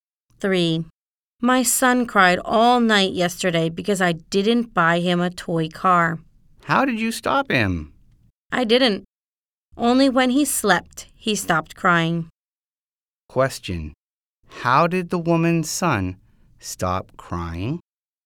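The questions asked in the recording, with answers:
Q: How did the woman's son stop crying?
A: He stopped when he fell asleep.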